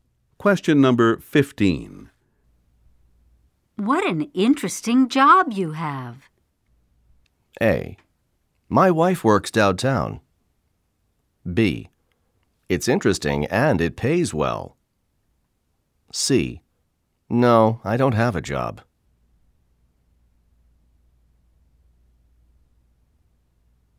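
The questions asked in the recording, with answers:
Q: What an interesting job you have.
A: B: It's interesting and it pays well.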